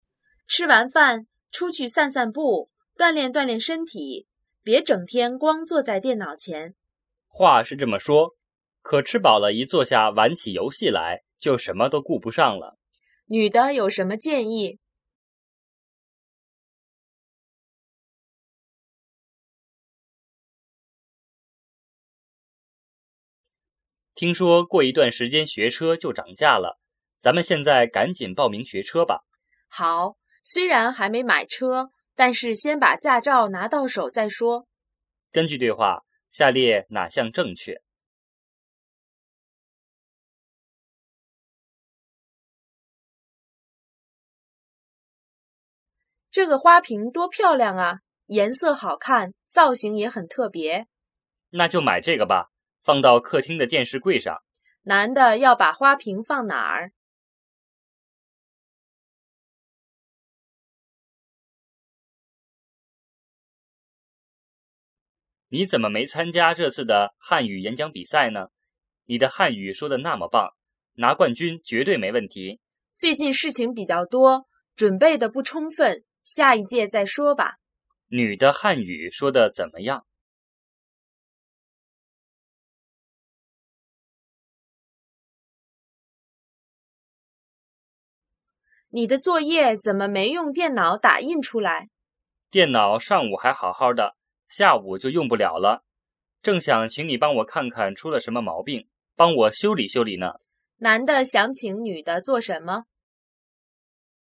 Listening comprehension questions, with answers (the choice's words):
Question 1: 女的有什么建议?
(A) 多照顾孩子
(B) 多锻炼身体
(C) 吃饭前去散步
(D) 吃完饭玩电脑游戏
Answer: 多锻炼身体

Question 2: 根据对话,下列哪项正确?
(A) 学车涨价了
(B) 女的打算买车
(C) 两人要去学车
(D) 现在学车有优惠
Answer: 两人要去学车

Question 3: 男的要把花瓶放哪儿?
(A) 卧室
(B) 餐厅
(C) 客厅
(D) 办公室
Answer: 客厅

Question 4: 女的汉语说得怎么样?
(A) 很出色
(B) 水平一般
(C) 还不充分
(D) 是演讲比赛冠军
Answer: 很出色

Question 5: 男的想请女的做什么?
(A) 写作业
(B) 提意见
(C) 诊断病情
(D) 修理电脑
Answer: 修理电脑

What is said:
女:吃完饭,出去散散步,锻炼锻炼身体,别整天光坐在电脑前。
男:话是这么说,可吃饱了一坐下玩起游戏来,就什么都顾不上了。
问:女的有什么建议?
男:听说过一段时间学车就涨价了,咱们现在赶紧报名学车吧。
女:好,虽然还没买车,但是先把驾照拿到手再说。
问:根据对话,下列哪项正确?
女:这个花瓶多漂亮啊!颜色好看,造型也很特别。
男:那就买这个吧,放到客厅的电视柜上。
问:男的要把花瓶放哪儿?
男:你怎么没参加这次的汉语演讲比赛呢?你的汉语说得那么棒,拿冠军绝对没问题。
女:最近事情比较多,准备得不充分,下一届再说吧。
女:你的作业怎么没用电脑打印出来?
男:电脑上午还好好的,下午就用不了了,正想请你帮我看看出了什么毛病,帮我修理修理呢。
问:男的想请女的做什么?

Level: 汉语水平考试(HSK)五级